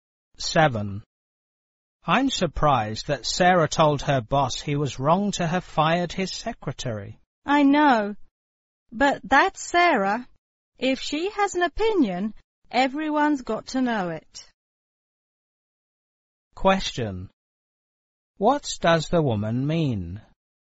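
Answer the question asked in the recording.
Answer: Sarah always speaks her mind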